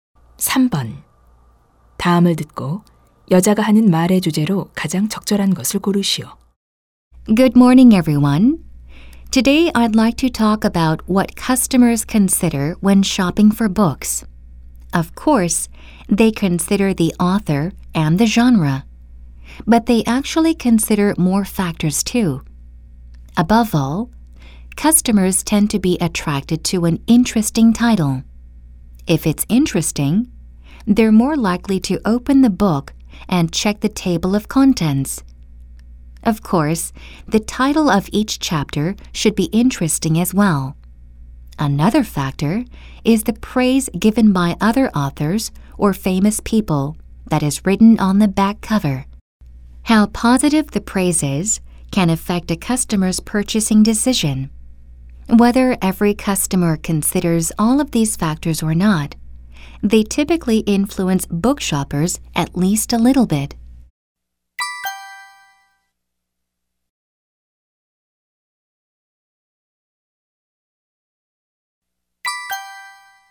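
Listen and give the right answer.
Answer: 고객이 책을 살 때 고려하는 요인들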